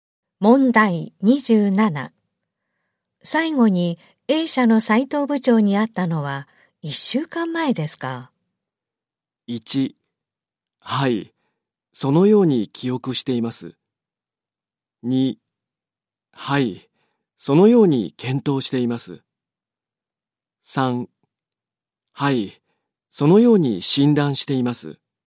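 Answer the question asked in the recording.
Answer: 1: はい、そのように記憶しています。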